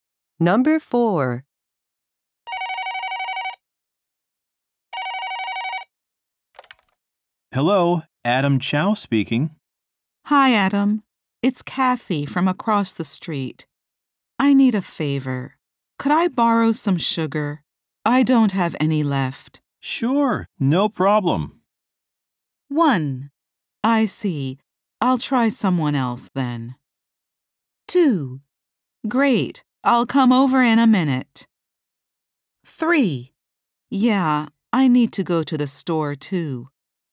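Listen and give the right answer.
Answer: 2: Great. I'll come over in a minute.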